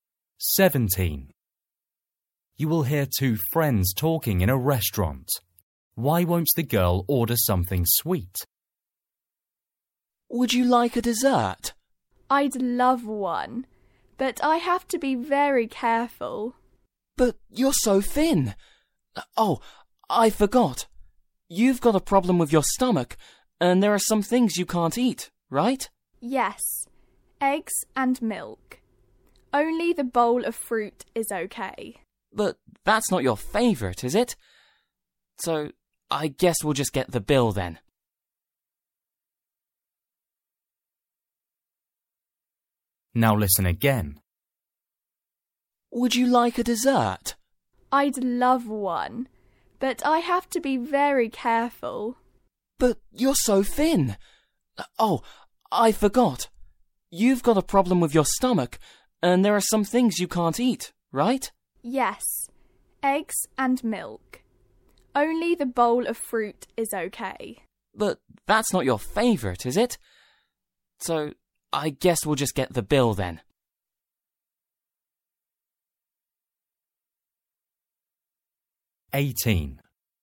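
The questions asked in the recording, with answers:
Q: Why won't the girl order something sweet?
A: she has a stomach problem and can't eat eggs and milk; only fruit is okay and she doesn't like it much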